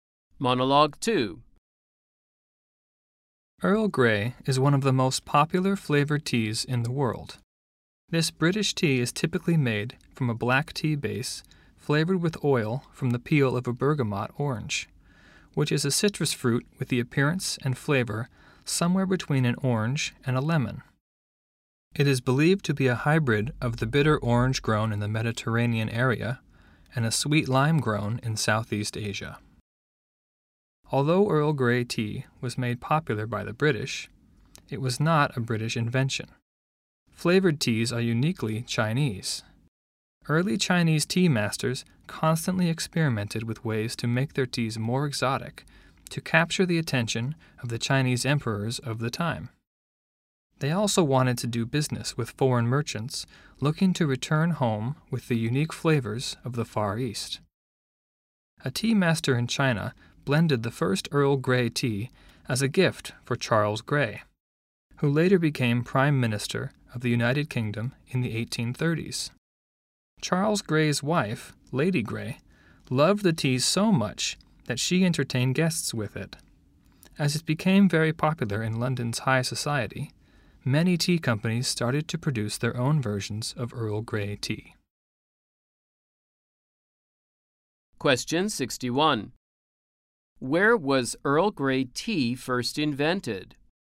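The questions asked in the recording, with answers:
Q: Where was Earl Grey tea first invented?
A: In China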